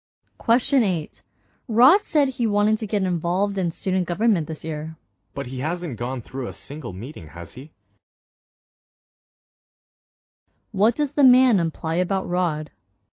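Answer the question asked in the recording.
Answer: He hasn't attended any student government meeting.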